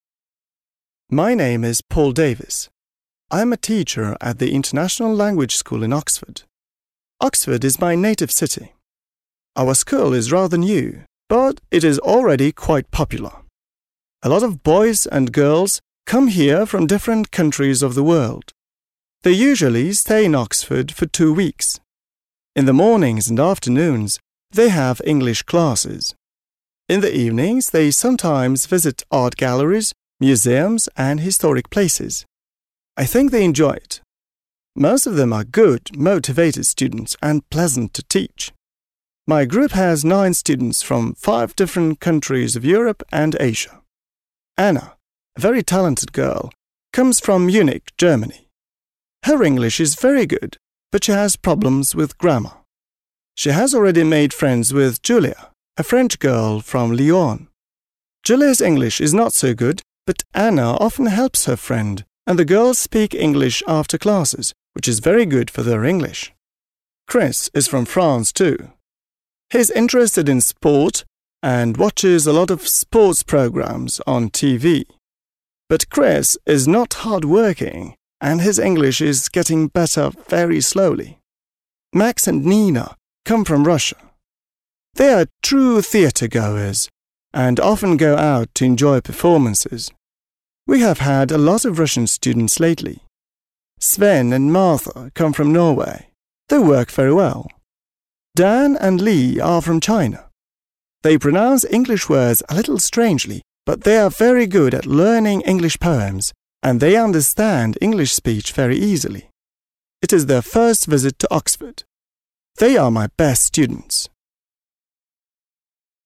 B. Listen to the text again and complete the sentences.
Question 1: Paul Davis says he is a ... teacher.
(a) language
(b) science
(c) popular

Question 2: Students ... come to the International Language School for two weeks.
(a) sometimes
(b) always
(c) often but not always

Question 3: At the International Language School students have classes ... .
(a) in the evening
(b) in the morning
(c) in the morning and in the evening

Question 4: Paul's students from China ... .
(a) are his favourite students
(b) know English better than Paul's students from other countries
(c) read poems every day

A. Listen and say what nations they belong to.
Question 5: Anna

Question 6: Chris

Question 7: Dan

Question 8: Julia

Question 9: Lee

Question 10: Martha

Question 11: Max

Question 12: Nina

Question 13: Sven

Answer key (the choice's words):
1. language
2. often but not always
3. in the morning
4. are his favourite students
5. Anna is German.
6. Chris is French.
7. Dan is Chinese.
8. Julia is French.
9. Lee is Chinese.
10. Martha is Norwegian.
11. Max is Russian.
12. Nina is Russian.
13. Sven is Norwegian.

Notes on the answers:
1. Здесь проверяется понимание деталей текста. В самом начале Пол представляется: «I am a teacher at the International Language School» (Я учитель в Международной языковой школе). Хотя он преподает английский, в контексте названия школы и вариантов ответа (science/popular), слово language является единственно верным определением его профиля согласно тексту.
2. В тексте используется наречие частотности: «They usually stay in Oxford for two weeks» (Они обычно остаются в Оксфорде на две недели).
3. Вариант in the morning является верным, так как это часть правды. Хотя в ответе не упомянут день (afternoon), утверждение, что они учатся утром — истинно.
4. В конце текста Пол говорит про Дэна и Ли (студентов из Китая): «They are my best students» (Они мои лучшие студенты). Слово best (лучшие) в контексте отношения учителя к ученикам очень близко по смыслу к favourite (любимые). Вариант про чтение стихов каждый день (read poems every day) неверен, в тексте сказано лишь, что они хороши в изучении стихов (good at learning English poems), но не сказано про «каждый день». Вариант про знание языка лучше других (know English better) также не подходит, так как автор упоминает их странное произношение (pronounce English words a little strangely).

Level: 7 класс